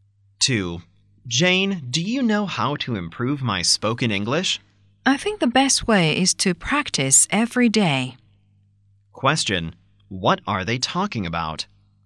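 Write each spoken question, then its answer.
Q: What are they talking about?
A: How to improve spoken English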